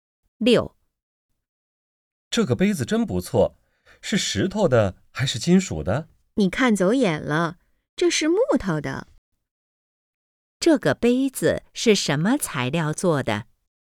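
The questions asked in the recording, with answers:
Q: 这个杯子是什么材料做的?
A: 木头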